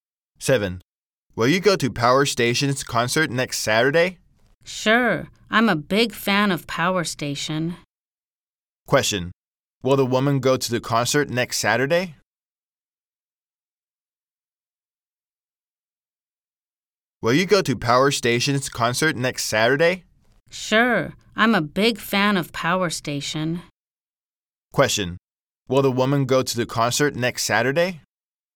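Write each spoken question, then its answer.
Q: Question. Will the woman go to the concert next Saturday?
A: Yes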